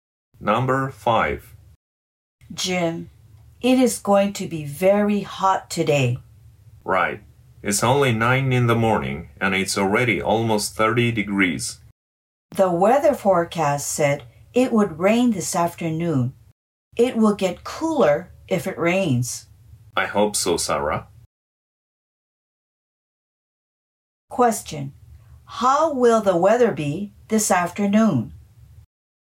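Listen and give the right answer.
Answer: Rainy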